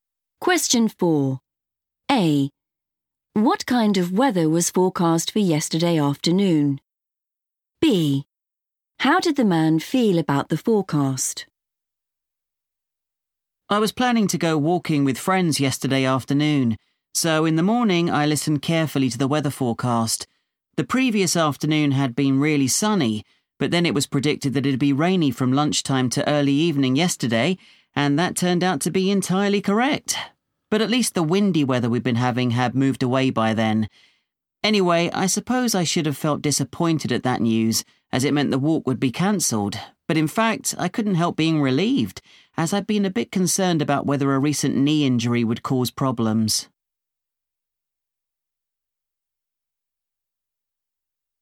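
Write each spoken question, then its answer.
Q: What kind of weather was forecast for yesterday afternoon?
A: rainy

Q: How did the man feel about the forecast?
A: relieved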